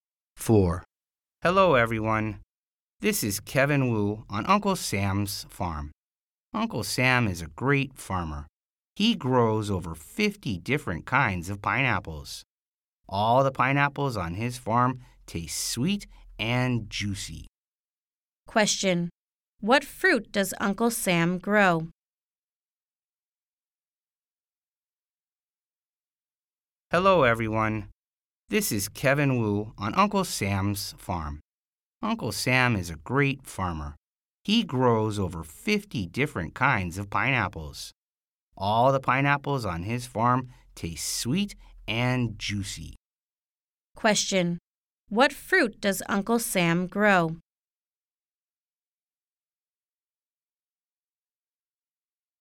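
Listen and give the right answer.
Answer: Pineapples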